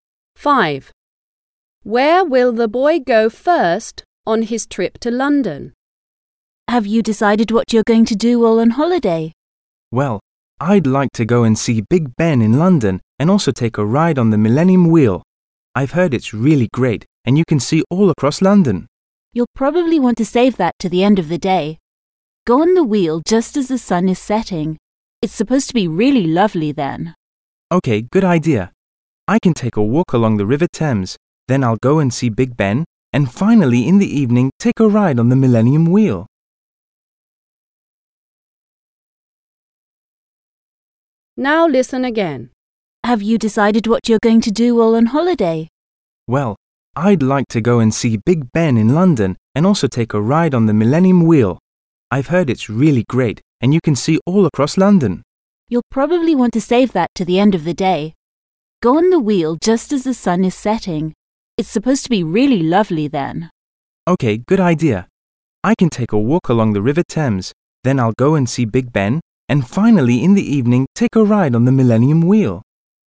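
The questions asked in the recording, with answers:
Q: Where will the boy go first on his trip to London?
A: a walk along the River Thames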